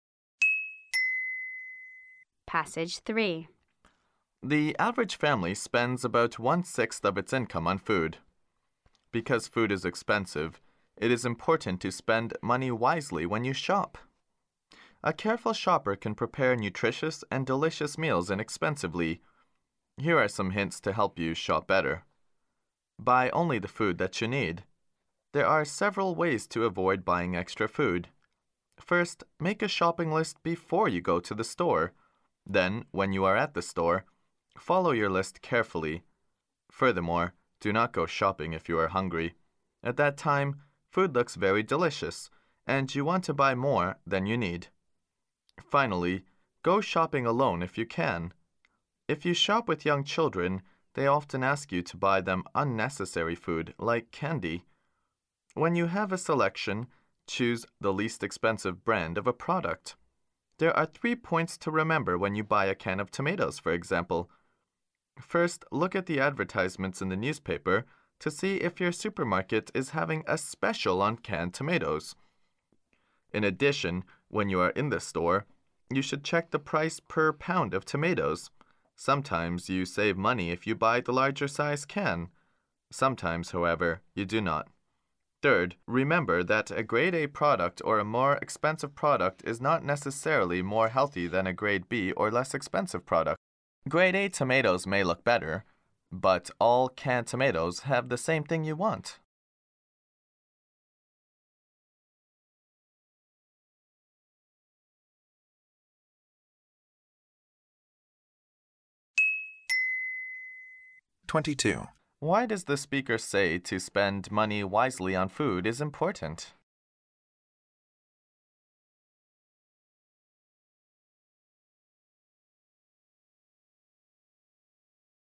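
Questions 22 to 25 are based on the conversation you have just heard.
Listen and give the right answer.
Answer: Because food is expensive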